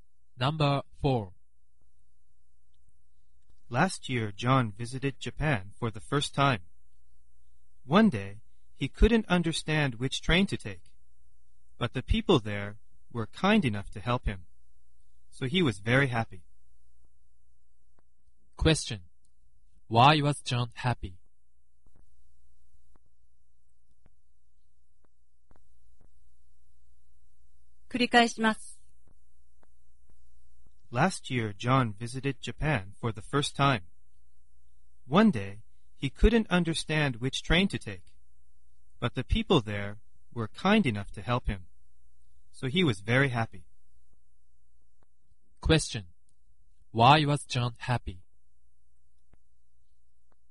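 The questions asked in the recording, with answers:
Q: Why was John happy?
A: Because people helped him find which train to take.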